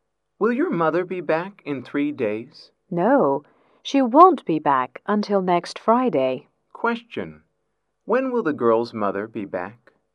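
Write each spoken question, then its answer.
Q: Question: When will the girl's mother be back?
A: Next Friday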